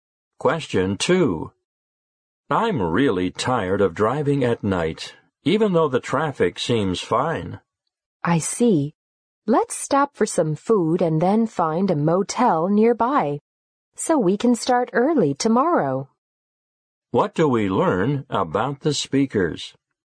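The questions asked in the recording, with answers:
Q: What do we learn about the speakers?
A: They will stop for food and then stay at a motel nearby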